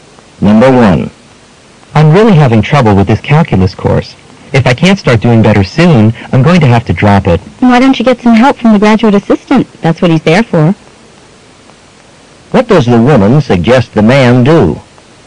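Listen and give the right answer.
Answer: Get help from the graduate assistant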